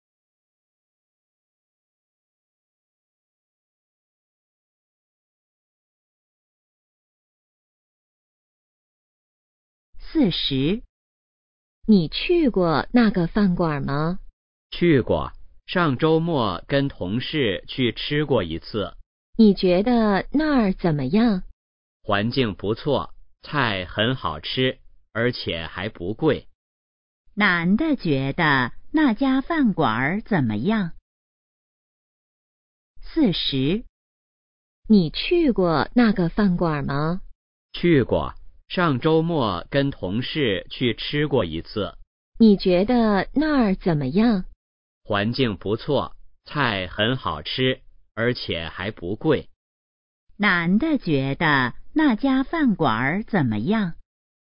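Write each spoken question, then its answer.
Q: 男的觉得那家饭馆怎么样?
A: 环境不错,菜好吃,还不贵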